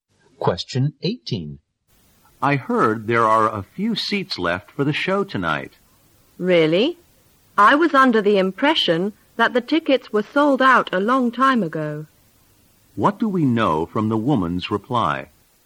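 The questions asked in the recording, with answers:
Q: What do we know from the woman's reply?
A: She thought the tickets had sold out long ago.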